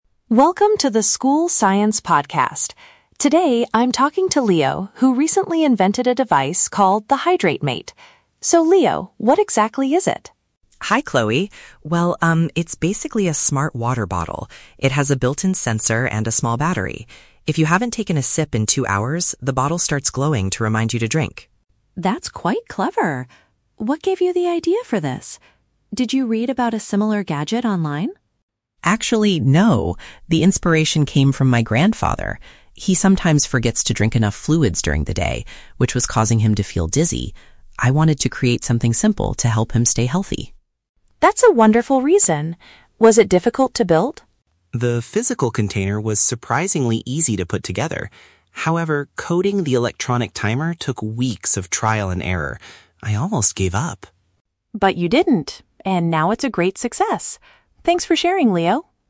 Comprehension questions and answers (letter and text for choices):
Listen to an interview with a student inventor on a school podcast. For each question, choose the correct answer (A, B, or C).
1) How does the "HydrateMate" alert the user that it is time to drink?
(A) It plays a loud warning sound.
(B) It sends a text message to their phone.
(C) It produces a visual signal.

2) Where did Leo get the concept for his invention?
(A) From observing a health issue an older family member had.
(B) From a science article he found on the internet.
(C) From his own personal habit of forgetting to drink water.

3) Which part of the project did Leo find the most challenging?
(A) Designing the shape of the physical container.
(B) Programming the software for the device.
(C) Persuading his grandfather to actually use it.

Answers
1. (C) It produces a visual signal.
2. (A) From observing a health issue an older family member had.
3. (B) Programming the software for the device.

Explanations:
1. Leo states that "the bottle starts glowing to remind you to drink." Option (C) uses a synonym ("visual signal" for "glowing"). Option (A) is a trap; it sounds like a common alarm feature, but it's not mentioned. Option (B) is also a trap; it's a common feature for smart devices, but this bottle only uses light.
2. Leo says the inspiration came from his grandfather, who was forgetting to drink fluids and feeling dizzy. Option (A) correctly paraphrases "grandfather" to "older family member" and "feeling dizzy" to "health issue." Option (B) is a trap; Chloe asks if he read about it online, but Leo replies, "Actually, no." Option (C) is a trap because it mentions forgetting to drink, but it applies to his grandfather, not Leo himself.
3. Leo explains that "coding the electronic timer took weeks of trial and error." Option (B) paraphrases "coding" as "programming" and "electronic timer" as "software." Option (A) is a trap; he says the physical container was "surprisingly easy." Option (C) is not mentioned in the audio.

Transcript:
Chloe: Welcome to the School Science Podcast. Today, I'm talking to Leo, who recently invented a device called the "HydrateMate." So, Leo, what exactly is it?
Leo: Hi Chloe. Well, um, it's basically a smart water bottle. It has a built-in sensor and a small battery. If you haven't taken a sip in two hours, the bottle starts glowing to remind you to drink.
Chloe: That's quite clever! What gave you the idea for this? Did you read about a similar gadget online?
Leo: Actually, no. The inspiration came from my grandfather. He sometimes forgets to drink enough fluids during the day, which was causing him to feel dizzy. I wanted to create something simple to help him stay healthy.
Chloe: That's a wonderful reason. Was it difficult to build?
Leo: The physical container was surprisingly easy to put together. However, coding the electronic timer took weeks of trial and error. I almost gave up!